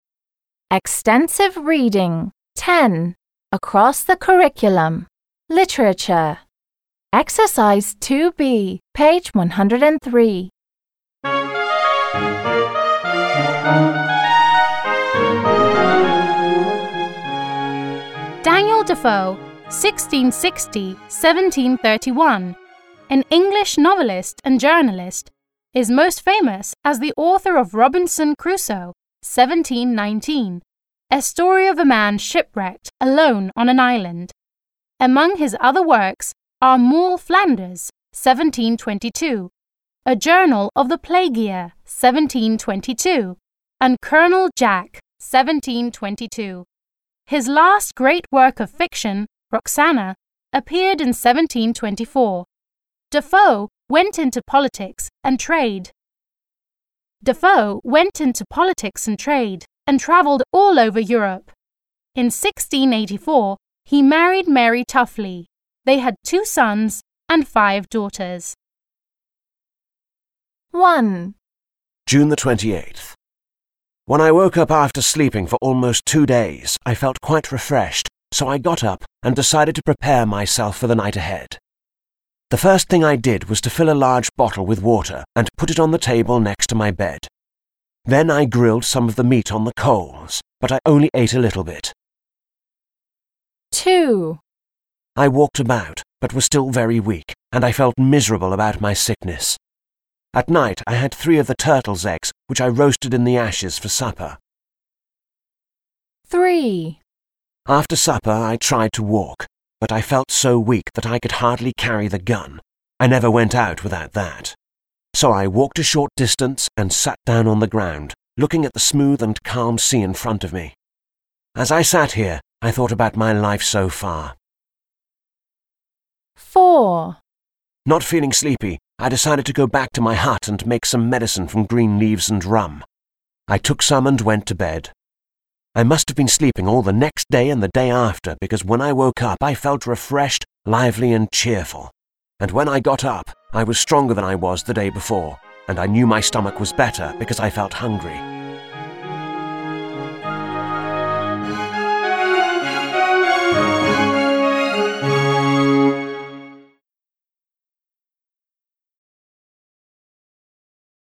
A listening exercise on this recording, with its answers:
2. b. Read the first sentence in each paragraph. What is the text about? Listen, read and check.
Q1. What is the text about?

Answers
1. Robinson Crusoe feels no good and the text describes what he does to get better.

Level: 7 класс